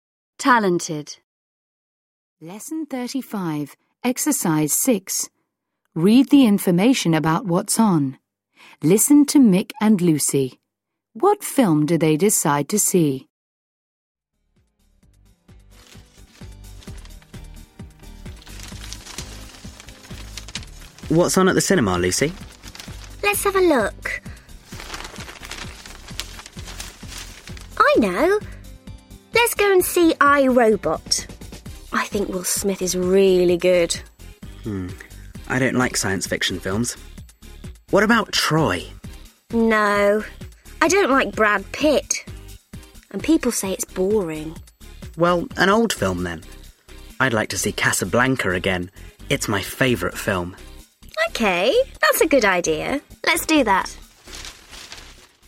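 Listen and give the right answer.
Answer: Casablanca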